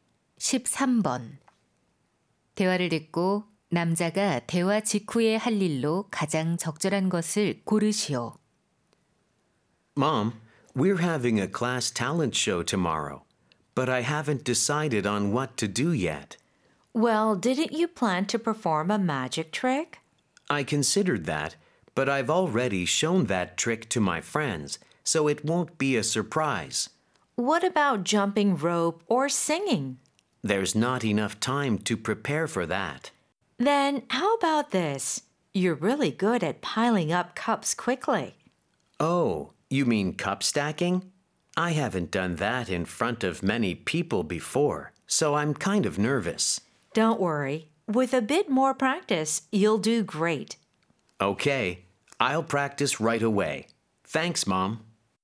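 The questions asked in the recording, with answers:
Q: 대화를 듣고 남자가 대화 직후에 할 일로 가장 적절한 것을 고르시오.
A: 컵 쌓기 연습하기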